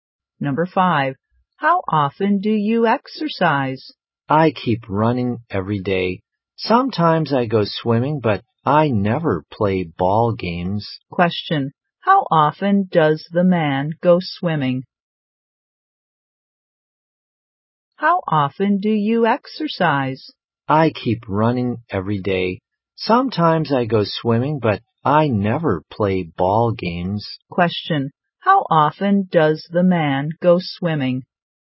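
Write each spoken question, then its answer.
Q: Question, how often does the man go swimming?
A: Sometimes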